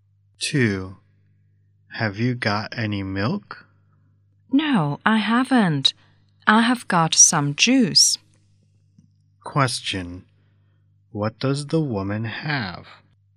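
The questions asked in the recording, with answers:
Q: Question.What does the woman have?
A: Some juice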